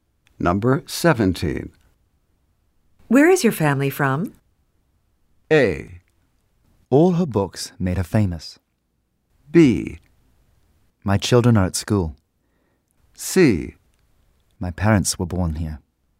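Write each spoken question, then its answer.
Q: Where is your family from?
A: C: My parents were born here.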